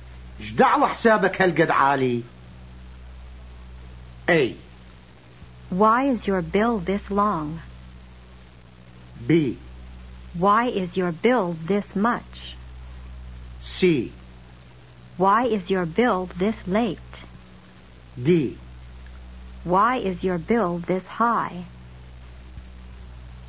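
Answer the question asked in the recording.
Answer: D: Why is your bill this high?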